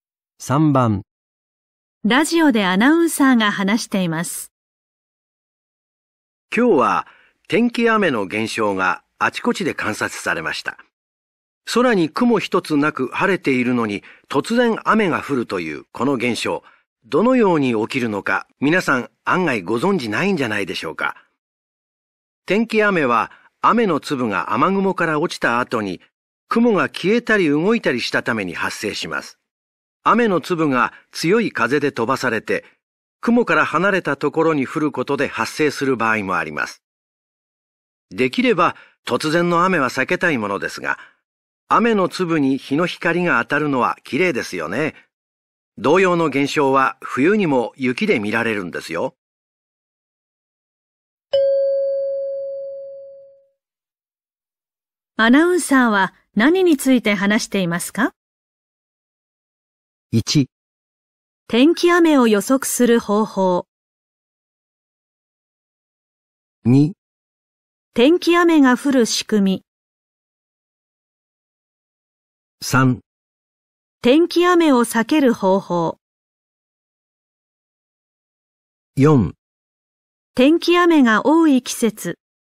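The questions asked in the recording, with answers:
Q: アナウンサーは何について話していますか?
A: 2: 天気雨が降る仕組み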